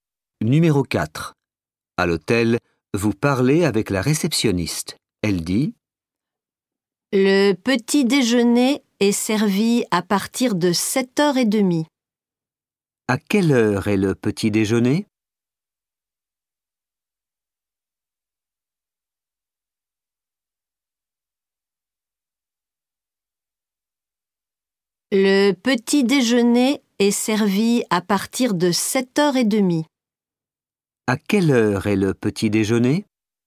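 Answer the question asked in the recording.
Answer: à partir de 7h30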